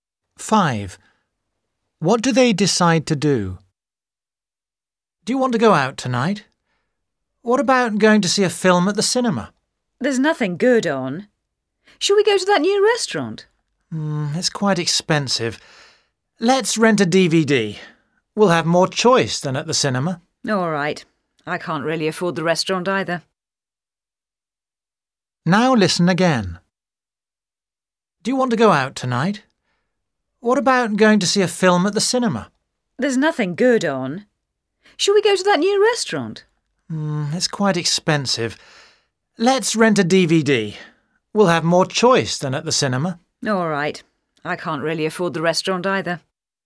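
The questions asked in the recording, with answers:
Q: What do they decide to do?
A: rent a DVD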